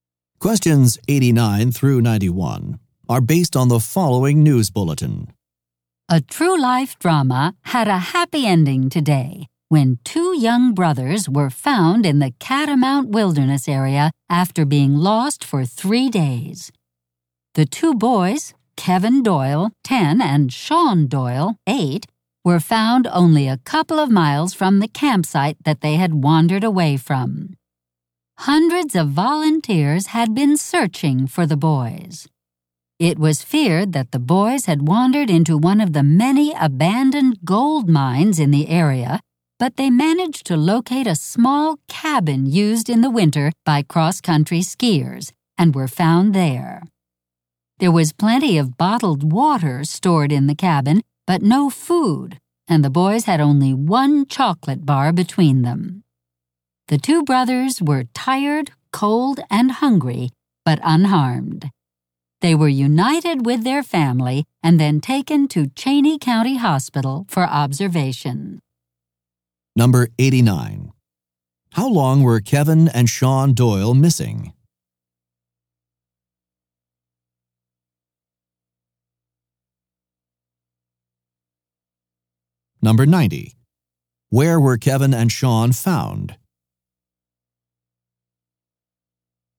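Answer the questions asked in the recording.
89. 3 days
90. In a small cabin used by cross-country skiers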